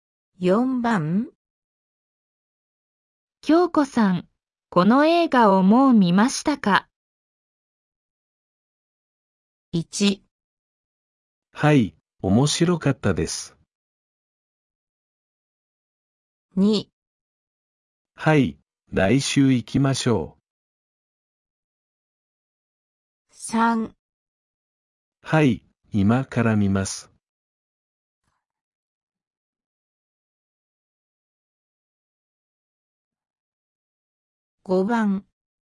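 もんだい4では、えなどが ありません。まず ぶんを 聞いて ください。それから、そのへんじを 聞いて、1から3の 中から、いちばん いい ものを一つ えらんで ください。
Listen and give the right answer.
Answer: 1

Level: N4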